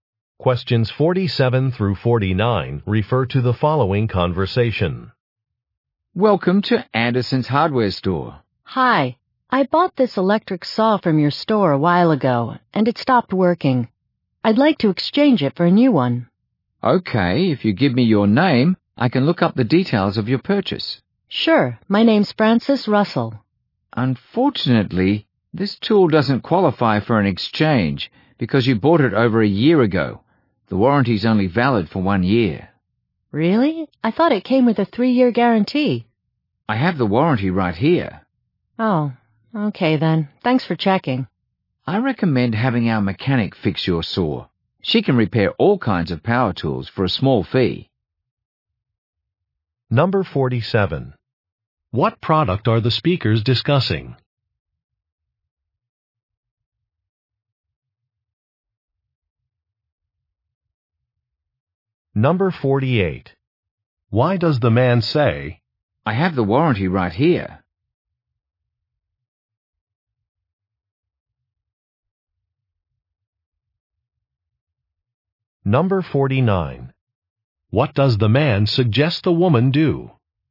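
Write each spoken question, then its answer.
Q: What product are the speakers discussing?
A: An electric saw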